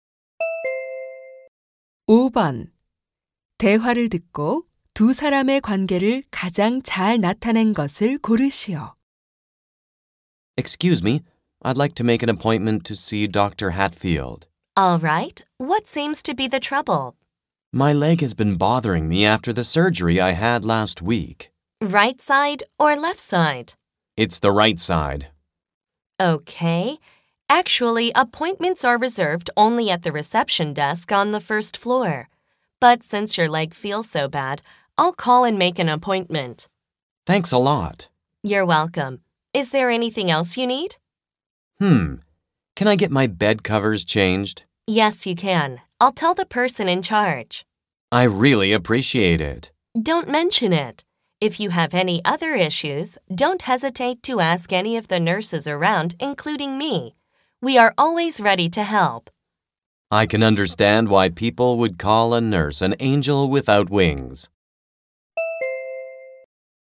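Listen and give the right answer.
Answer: 간호사 - 환자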